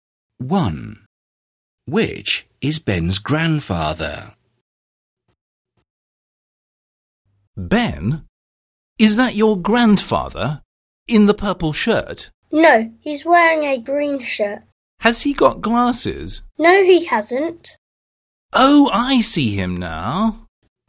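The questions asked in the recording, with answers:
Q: Which is Ben's grandfather?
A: The man in the green shirt without glasses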